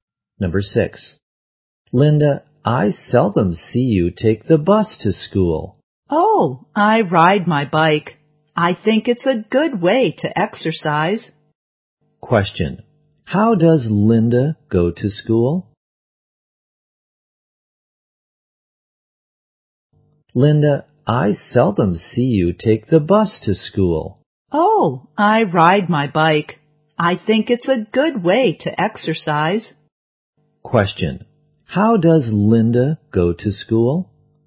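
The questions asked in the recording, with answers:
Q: how does Linda go to school?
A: By bike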